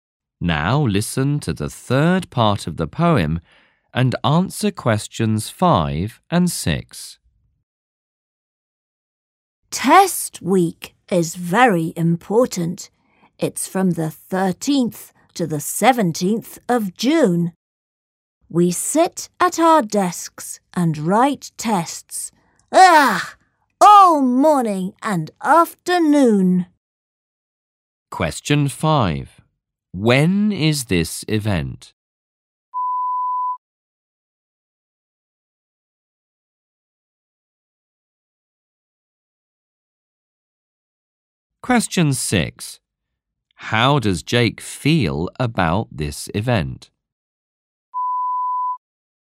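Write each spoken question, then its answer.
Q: When is this event?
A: From the 13th to the 17th of June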